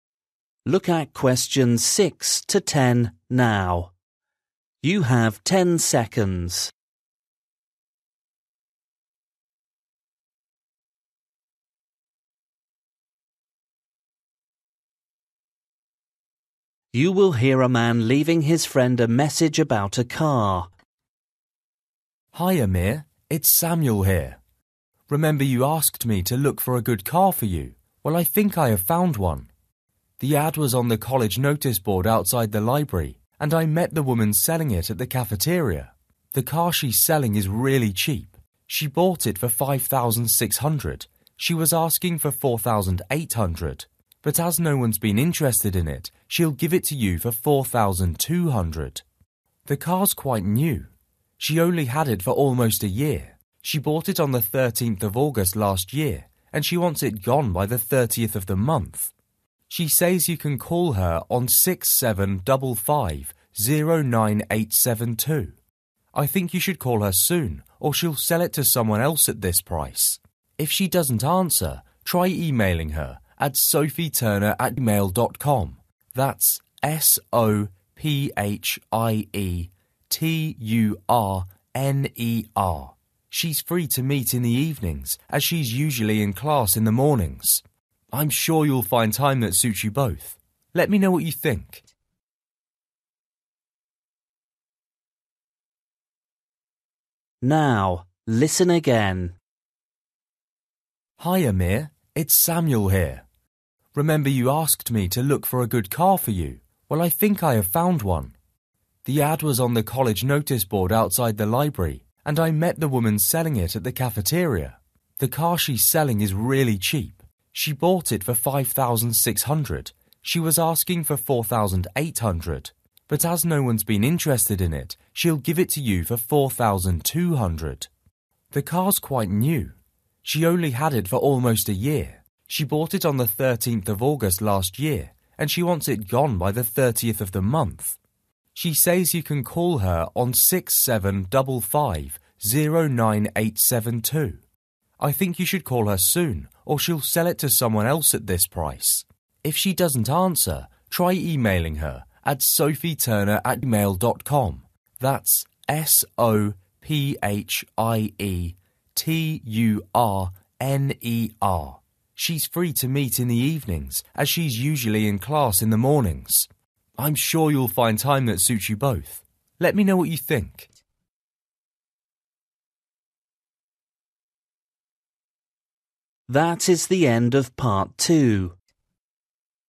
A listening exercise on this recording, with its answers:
For each question, write the correct answer in the gap. Write one word or a number or a date or a time.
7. 13th ........................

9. ........................ @mail.com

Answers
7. August
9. sophieturner

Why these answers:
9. try emailing her at sophieturner@mail.com. That S-O-P-H-I-E-T-U-R-N-E-R.

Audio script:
It's Samuel here. Remember you asked me to look for a good car for you? Well, I think I have found one. The ad was on the college notice board outside the library and I met the woman selling it at the cafeteria.
The car she's selling is really cheap. She bought it for £5,600, she was asking for £4,800 but as no one's been interested in it, (6) she'll give it to you for £4,200.
The car's quite new. She's only had it for almost a year. (7) She bought it on the 13th of August last year and she wants it gone by the 30th of the month.
She says (8) you can call her on 675509872. I think you should call her soon or she'll sell it to someone else at this price.
If she doesn't answer, (9) try emailing her at sophieturner@mail.com. That S-O-P-H-I-E-T-U-R-N-E-R.
(10) She's free to meet in the evenings as she's usually in class in the mornings. I'm sure you'll find time that suits you both. Let me know what you think.

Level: KET (A2)